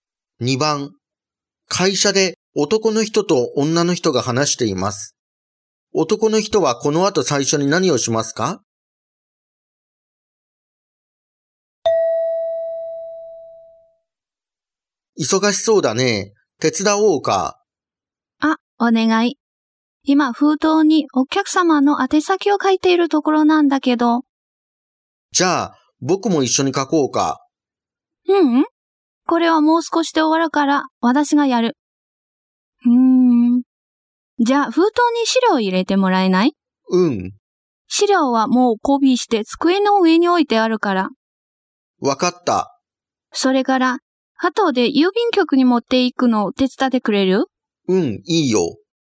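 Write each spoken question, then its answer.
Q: 男の人はこの後最初に何をしますか?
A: 封筒に資料を入れる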